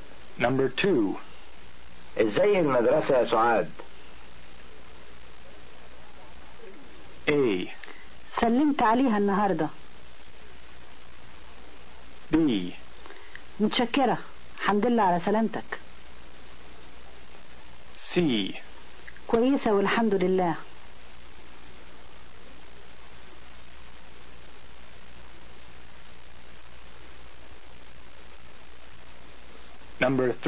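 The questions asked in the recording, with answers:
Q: إزاي المدرسة يا سعاد؟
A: C: كويسة والحمد لله.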